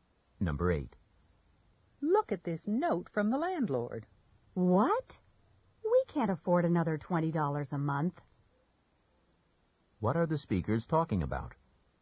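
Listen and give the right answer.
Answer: A rent increase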